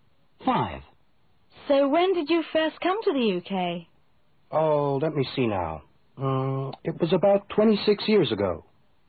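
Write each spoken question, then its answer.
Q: So when did you first come to the UK?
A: about 26 years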